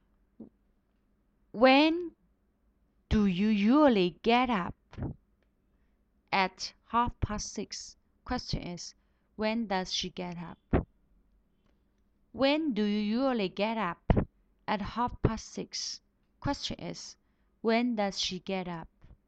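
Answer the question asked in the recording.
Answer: At 6:30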